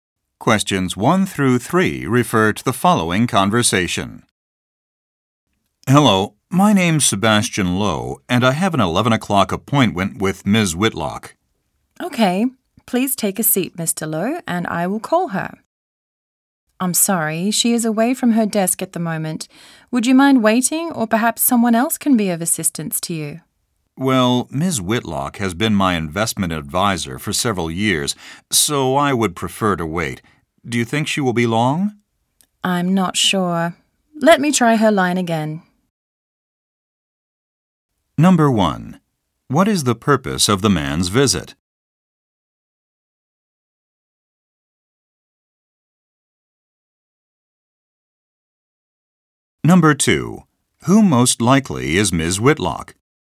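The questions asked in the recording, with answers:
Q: What is the purpose of the man's visit?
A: To meet his investment advisor for an appointment

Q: Who most likely is Ms. Whitlock?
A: An investment advisor

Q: What will the woman probably do next?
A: Call Ms. Whitlock's line again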